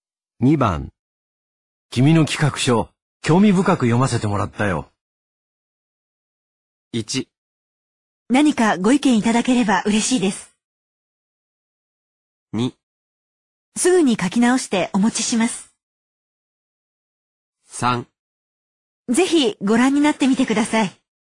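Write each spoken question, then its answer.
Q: 君の企画書、興味深く読ませてもらったよ。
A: 1: 何かご意見いただければ嬉しいです。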